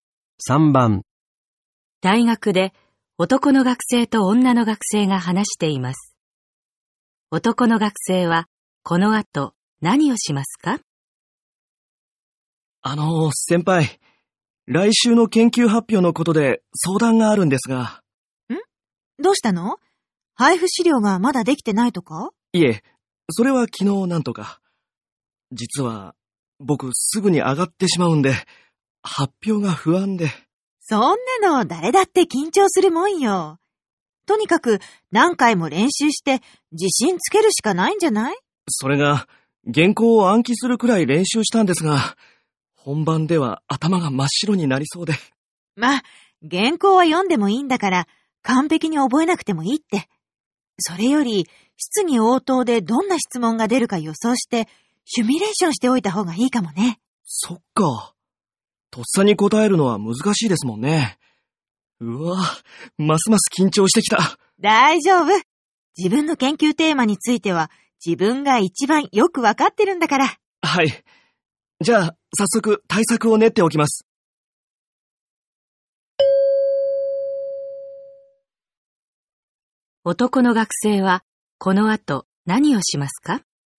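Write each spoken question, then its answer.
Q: 男の学生はこの後何をしますか?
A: 質疑応答での質問を予想して練習する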